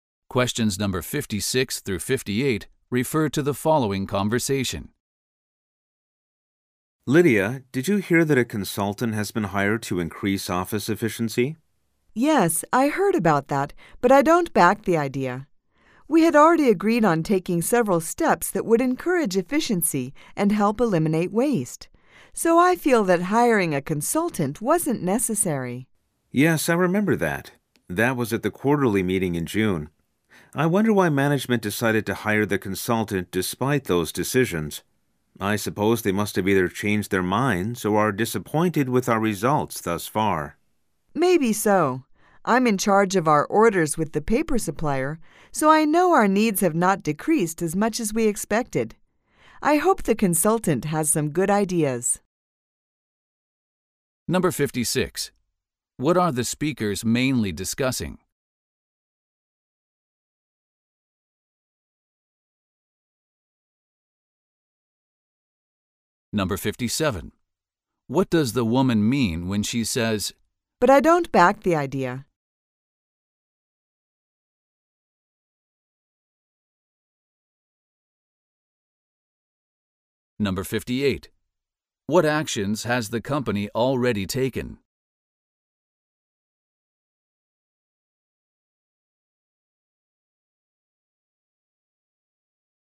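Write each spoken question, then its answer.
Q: What are the speakers mainly discussing?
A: The hiring of a consultant to increase office efficiency

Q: What does the woman mean when she says, "But I don't back the idea"?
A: She does not support hiring the consultant

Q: What actions has the company already taken?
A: It agreed on steps to encourage efficiency and eliminate waste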